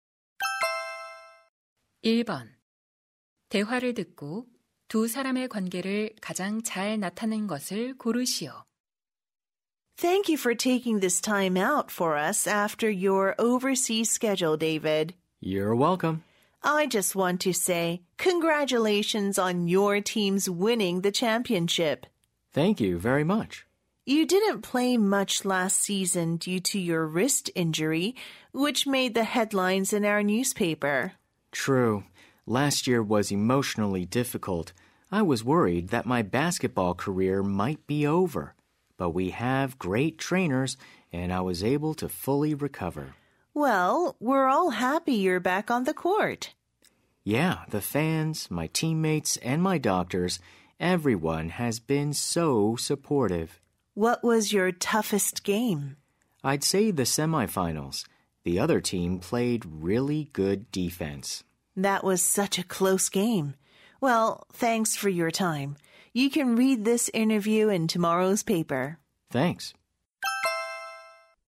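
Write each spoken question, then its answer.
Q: 대화를 듣고 두 사람의 관계를 가장 잘 나타낸 것을 고르시오.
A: 신문 기자 - 농구 선수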